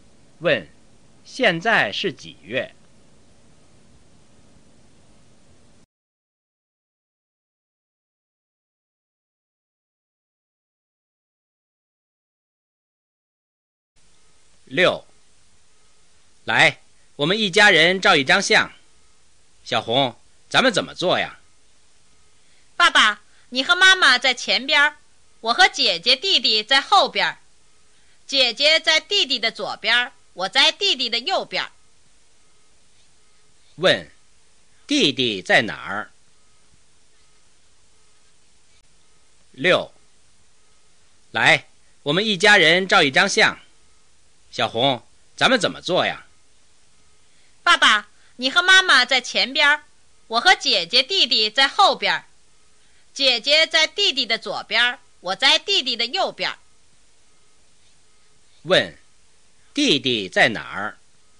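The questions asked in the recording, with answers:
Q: 弟弟在哪儿?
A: 在后边,姐姐和小红中间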